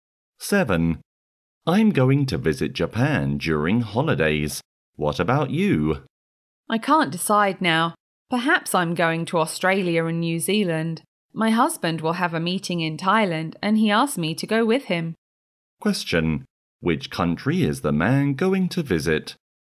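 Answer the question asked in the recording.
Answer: Japan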